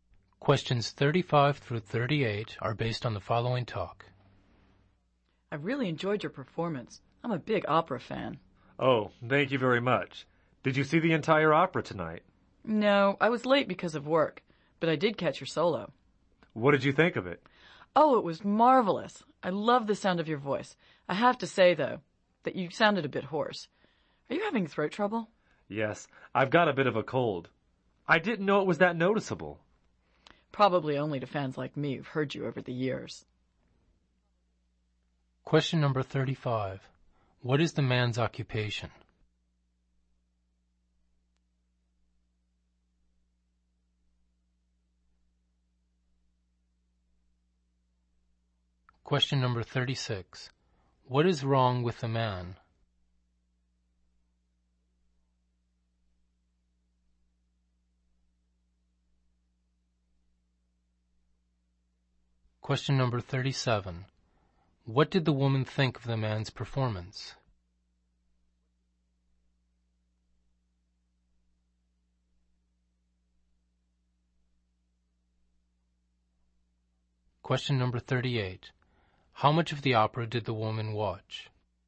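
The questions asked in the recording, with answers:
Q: What is the man's occupation?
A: Opera singer

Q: What is wrong with the man?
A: He has a cold and is hoarse

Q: What did the woman think of the man's performance?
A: It was marvelous

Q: How much of the opera did the woman watch?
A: Only part of it; she came late but caught his solo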